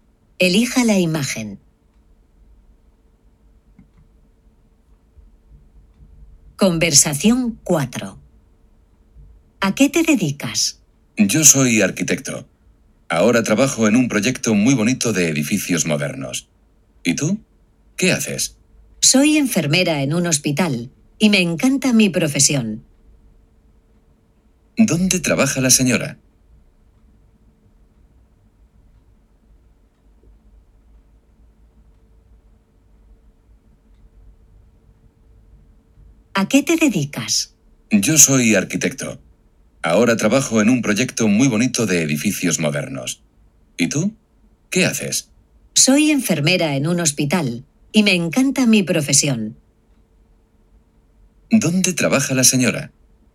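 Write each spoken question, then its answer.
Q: ¿Dónde trabaja la señora?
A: En un hospital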